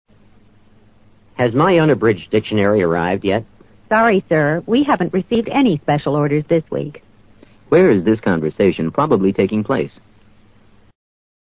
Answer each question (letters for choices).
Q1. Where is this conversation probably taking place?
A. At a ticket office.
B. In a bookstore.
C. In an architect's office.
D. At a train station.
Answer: B

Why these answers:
dictionary, order等词已提供了足够进行判断的信息。A,C,D三种场所都不可能。 unabridged:未节略的。 special order 指书店为满足读者的特殊需要而办理的订购业务。 architect's office: 建筑设计办公室。